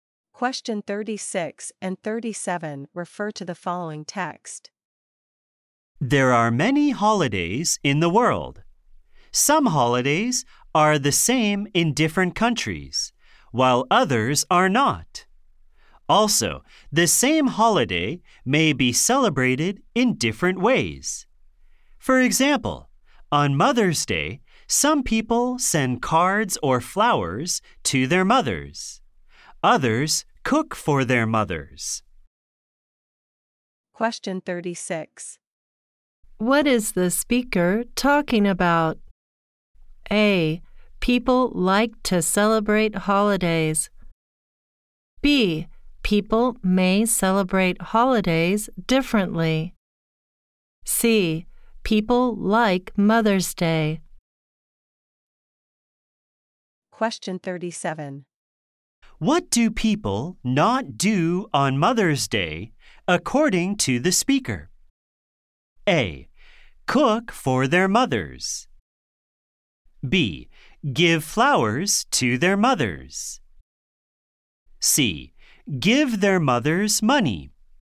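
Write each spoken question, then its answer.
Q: What is the speaker talking about?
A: B: People may celebrate holidays differently.

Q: What do people not do on Mother's Day, according to the speaker?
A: C: Give their mothers money.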